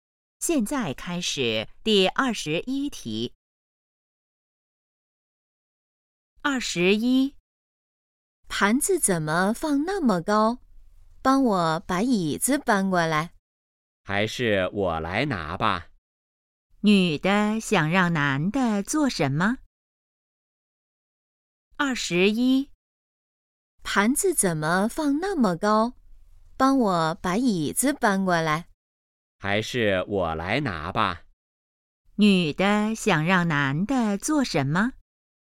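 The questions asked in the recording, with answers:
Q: 女的想让男的做什么?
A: 搬椅子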